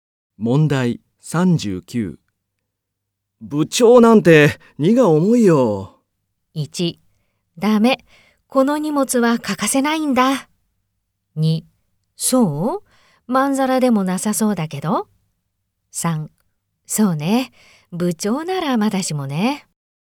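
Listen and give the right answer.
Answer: 2: そう?まんざらでもなさそうだけど。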